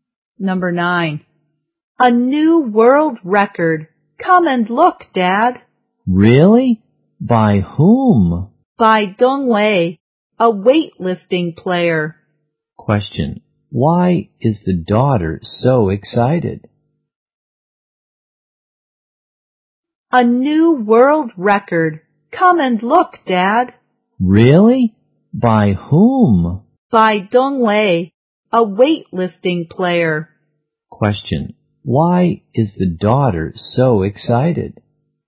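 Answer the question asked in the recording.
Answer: Dong Wei set a new world record.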